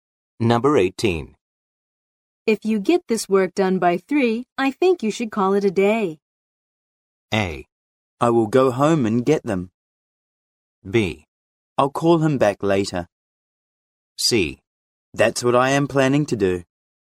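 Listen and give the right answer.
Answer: C: That's what I am planning to do.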